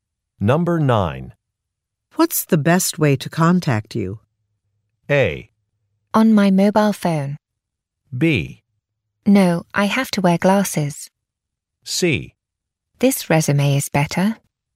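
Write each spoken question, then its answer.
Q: What's the best way to contact you?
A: A: On my mobile phone.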